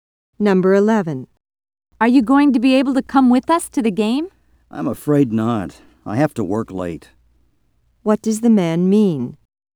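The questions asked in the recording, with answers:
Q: What does the man mean?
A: He can't go to the game because he has to work late.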